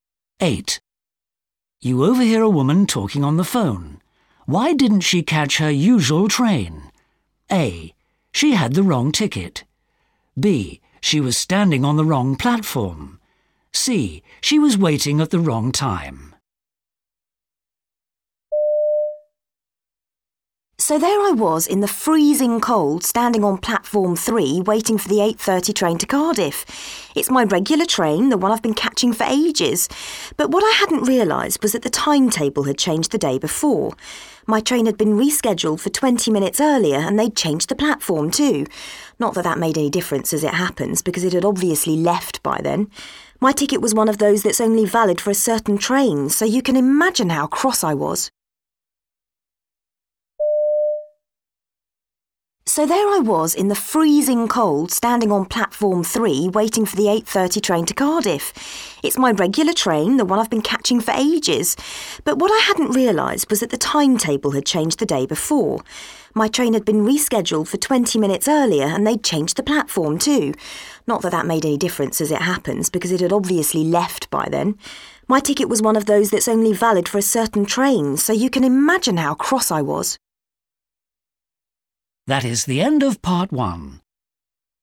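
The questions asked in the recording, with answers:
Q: Why didn't she catch her usual train?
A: C: She was waiting at the wrong time.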